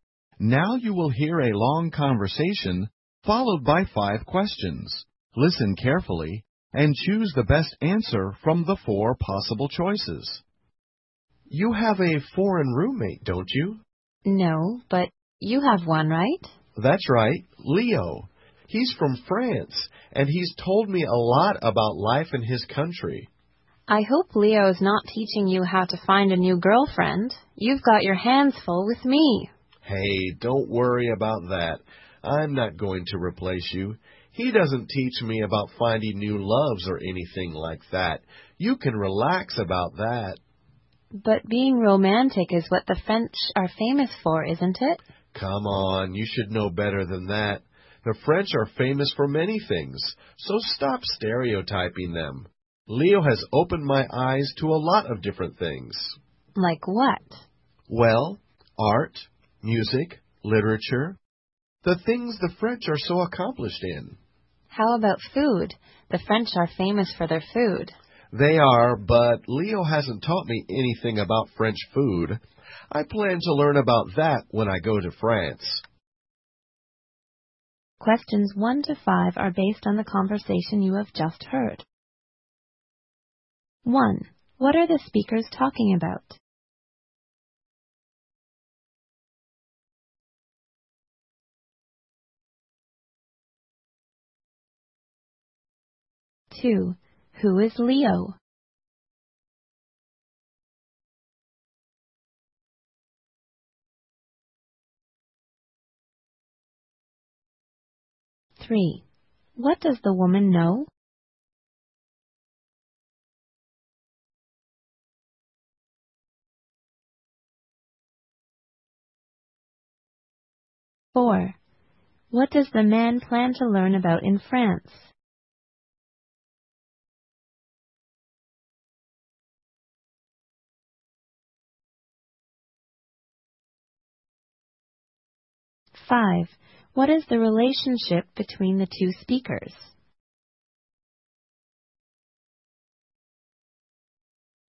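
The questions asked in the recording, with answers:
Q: What are the speakers talking about?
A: The man's French roommate Leo and what he has learned from him.

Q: Who is Leo?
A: The man's roommate from France.

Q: What does the man plan to learn about in France?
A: French food.

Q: What is the relationship between the two speakers?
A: Boyfriend and girlfriend.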